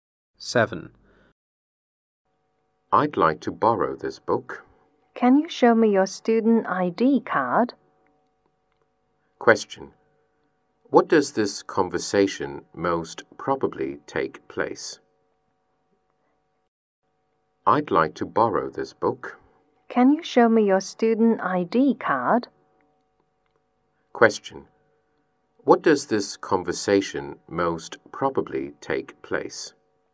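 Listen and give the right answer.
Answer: In a library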